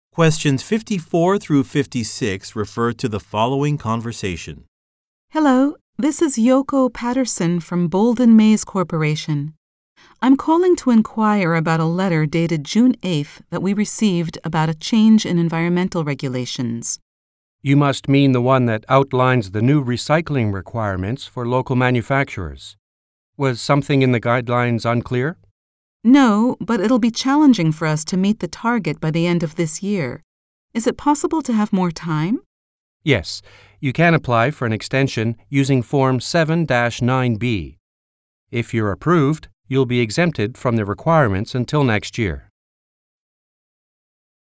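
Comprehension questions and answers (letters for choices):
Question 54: Why is the woman calling?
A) To explain a procedure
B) To place an order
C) To confirm an appointment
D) To discuss guidelines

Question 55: What type of organization does the woman work for?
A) A manufacturing company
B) A government department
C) A law office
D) An IT firm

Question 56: What is the purpose of Form 7-9B?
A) To apply for a building permit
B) To request additional time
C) To receive a tax exemption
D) To obtain more documents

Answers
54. D
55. B
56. B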